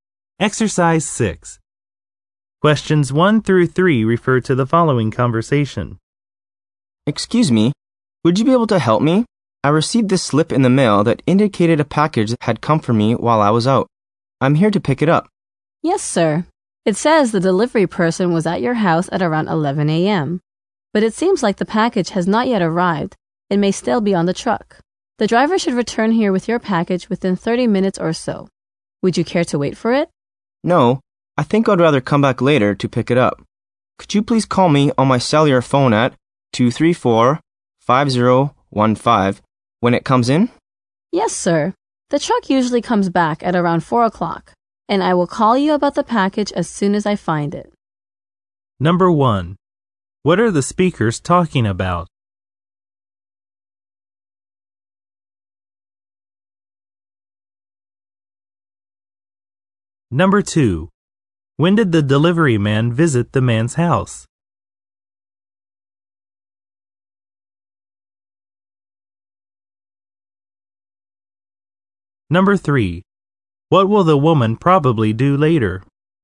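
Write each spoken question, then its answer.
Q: What are the speakers talking about?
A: Picking up a package

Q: When did the delivery man visit the man's house?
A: Around 11 a.m.

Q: What will the woman probably do later?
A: Call the man when the package arrives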